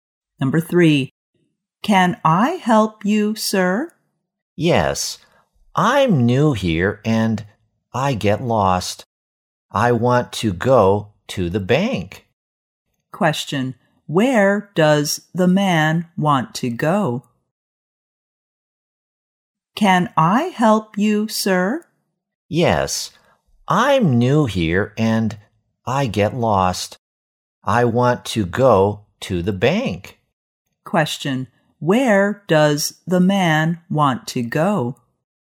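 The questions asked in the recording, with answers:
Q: Where does the man want to go?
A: To the bank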